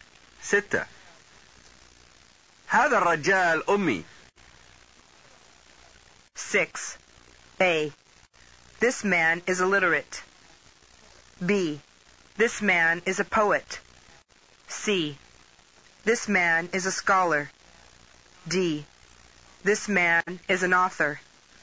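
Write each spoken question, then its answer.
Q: 6. هذا الرجال أمي.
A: A: This man is illiterate.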